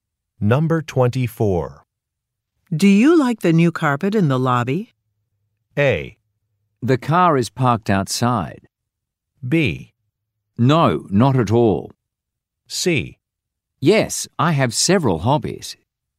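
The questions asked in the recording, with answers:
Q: Do you like the new carpet in the lobby?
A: B: No, not at all.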